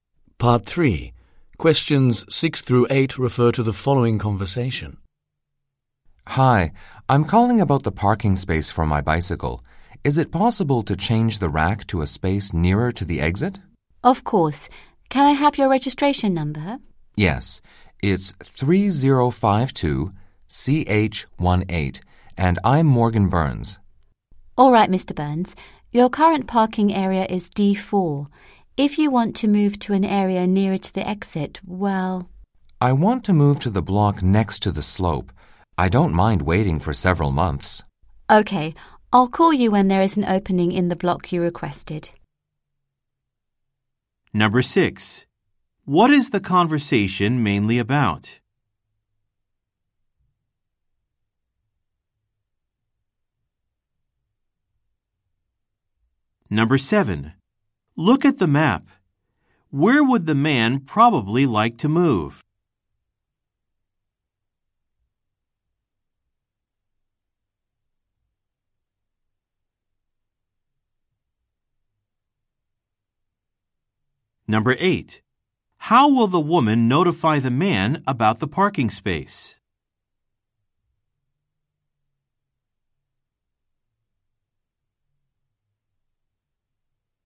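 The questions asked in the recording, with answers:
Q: What is the conversation mainly about?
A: Changing a bicycle parking space to one nearer the exit

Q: How will the woman notify the man about the parking space?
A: By calling him on the phone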